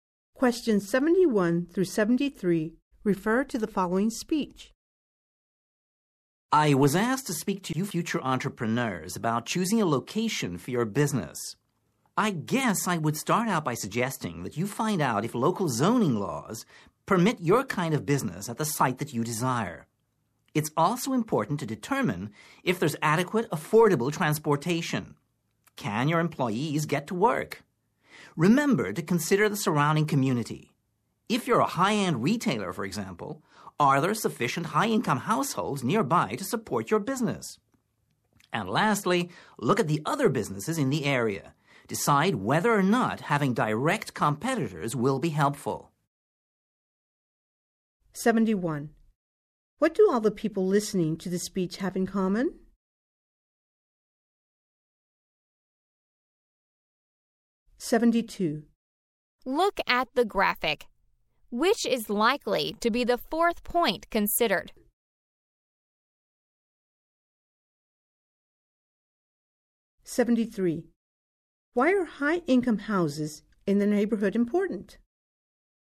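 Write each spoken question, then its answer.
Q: What do all the people listening to the speech have in common?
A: They are future entrepreneurs

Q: Why are high-income houses in the neighborhood important?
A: They can support a high-end retailer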